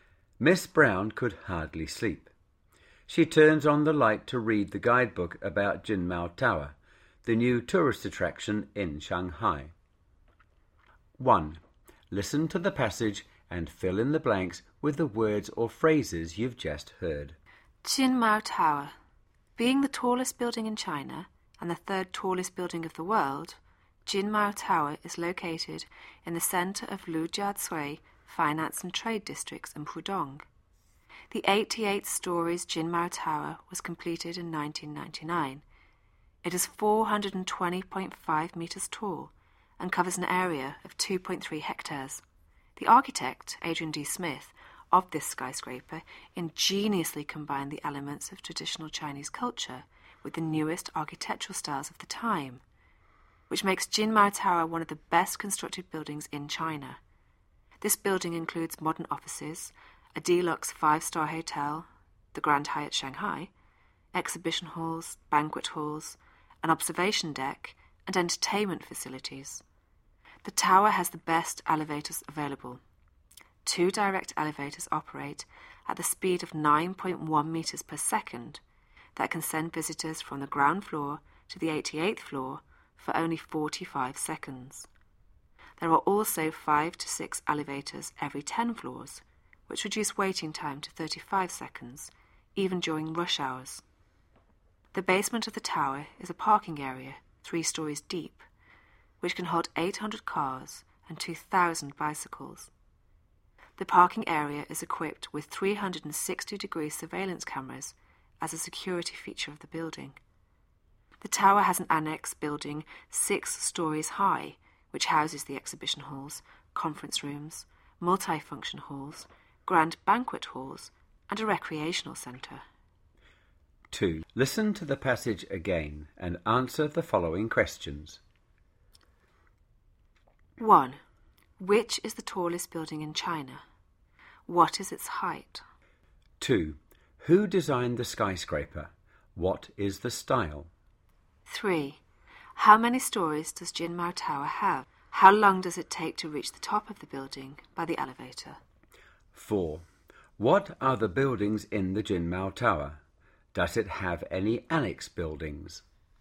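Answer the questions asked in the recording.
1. Jin Mao Tower
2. 420.5 metres
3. Adrian D. Smith
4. Traditional Chinese culture combined with the newest architectural styles
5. 88
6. 45 seconds
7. Offices, a five-star hotel (Grand Hyatt), exhibition halls, banquet halls, an observation deck and entertainment facilities
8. Yes, a six-story annex building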